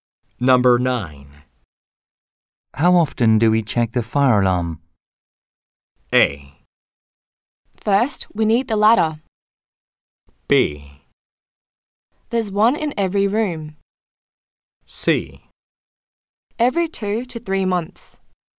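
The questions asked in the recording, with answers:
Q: How often do we check the fire alarm?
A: C: Every 2 to 3 months.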